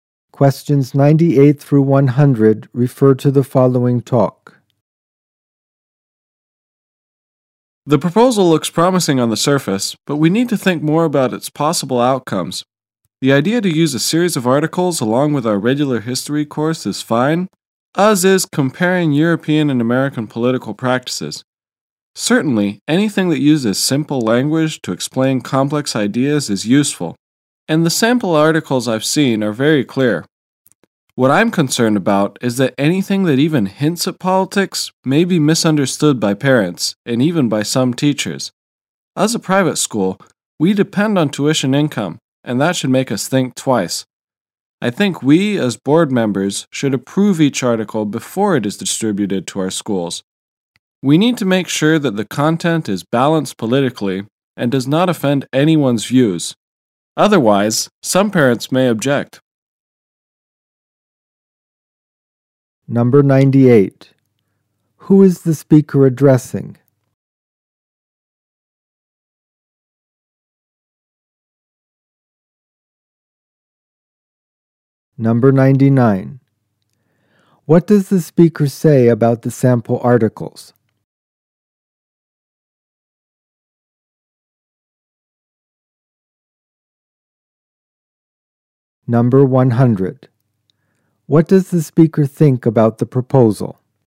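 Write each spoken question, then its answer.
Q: Who is the speaker addressing?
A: School board members

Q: What does the speaker say about the sample articles?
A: They are very clear

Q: What does the speaker think about the proposal?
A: It looks promising, but the board should approve each article first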